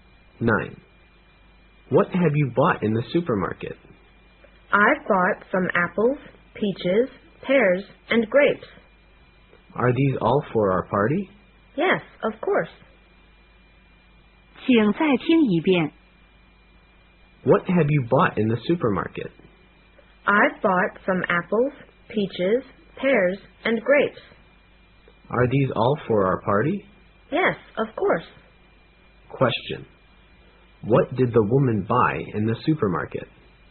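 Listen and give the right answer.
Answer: Fruit: apples, peaches, pears and grapes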